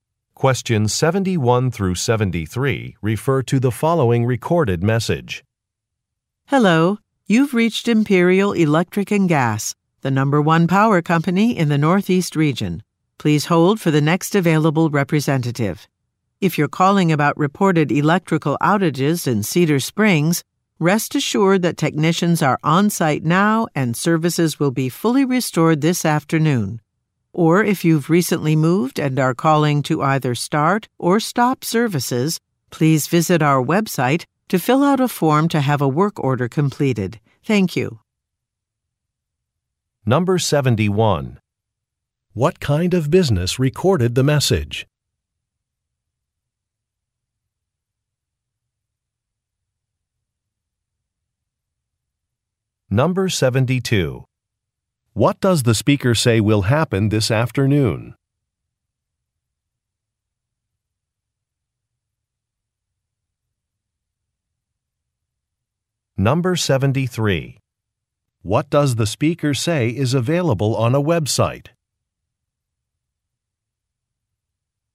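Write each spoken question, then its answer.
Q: What kind of business recorded the message?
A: A power (electric and gas) company

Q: What does the speaker say will happen this afternoon?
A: Services in Cedar Springs will be fully restored

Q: What does the speaker say is available on a website?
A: A form to start or stop services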